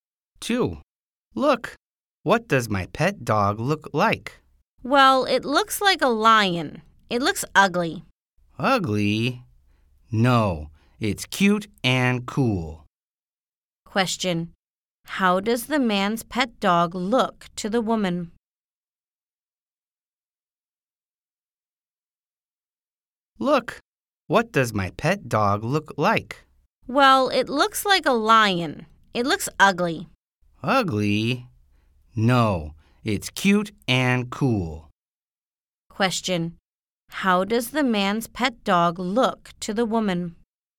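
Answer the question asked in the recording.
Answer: Ugly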